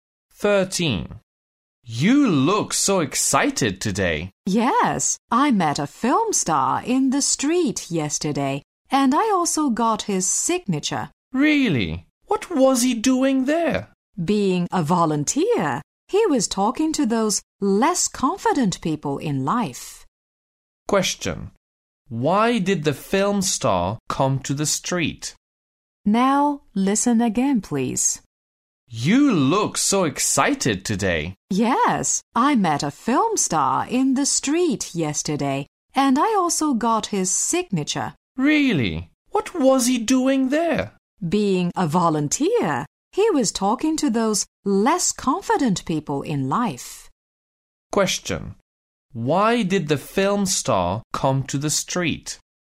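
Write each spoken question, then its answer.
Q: Why did the film star come to the street?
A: To volunteer, talking to less confident people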